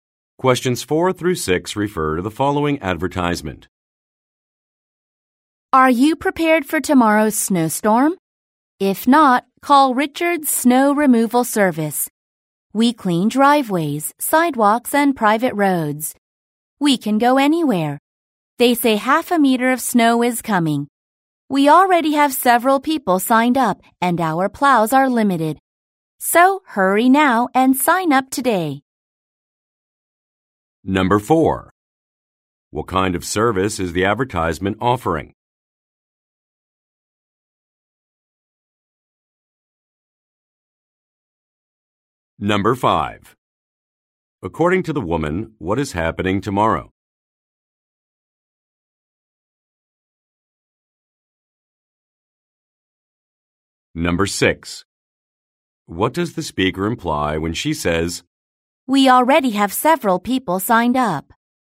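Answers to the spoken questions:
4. Snow removal
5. A snowstorm
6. Listeners should sign up quickly because space is limited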